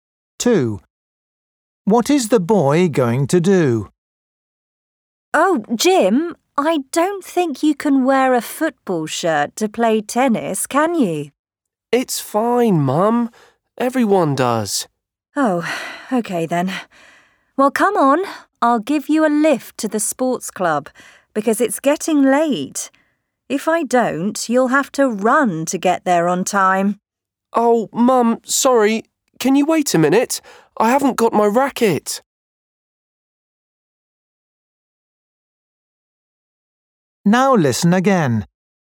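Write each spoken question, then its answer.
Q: What is the boy going to do?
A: play tennis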